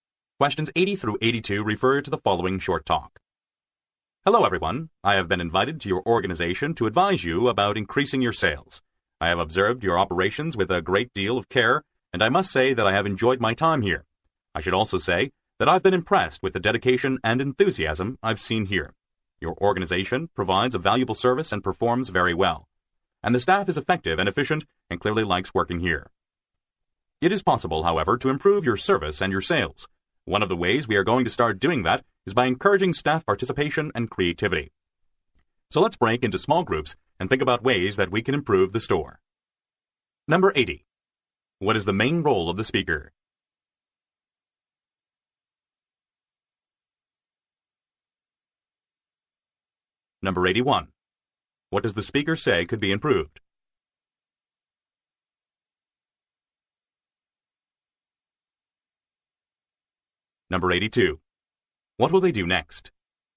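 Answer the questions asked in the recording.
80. A consultant advising on increasing sales
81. Service and sales
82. Break into small groups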